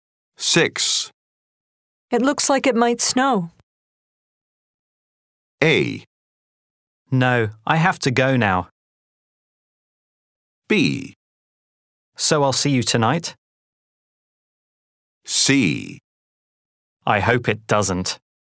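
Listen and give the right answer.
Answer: C: I hope it doesn't.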